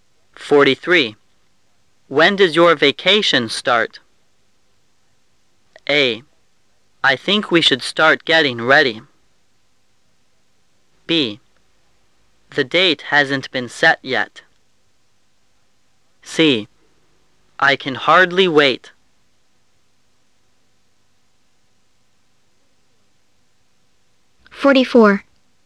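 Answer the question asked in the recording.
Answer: B: The date hasn't been set yet.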